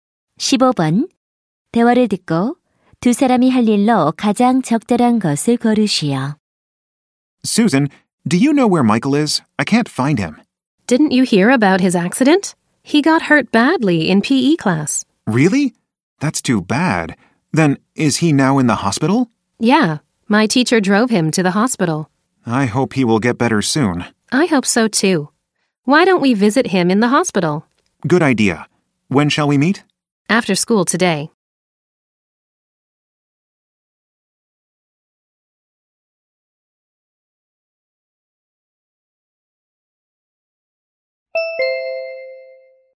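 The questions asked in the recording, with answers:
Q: 대화를 듣고 두 사람이 할 일로 가장 적절한 것을 고르시오.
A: 병원에 있는 Michael 병문안 가기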